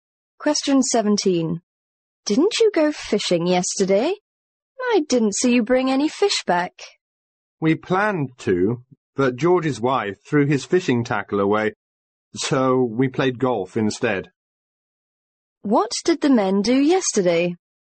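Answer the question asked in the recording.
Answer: They played golf.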